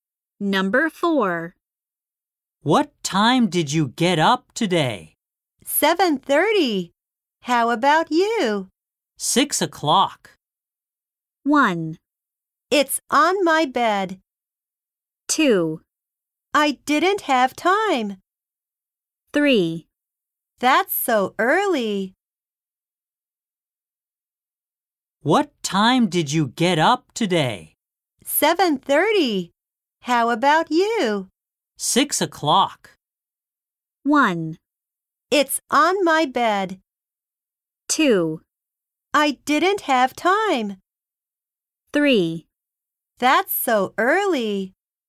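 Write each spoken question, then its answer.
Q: 6 o'clock.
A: 3: That's so early.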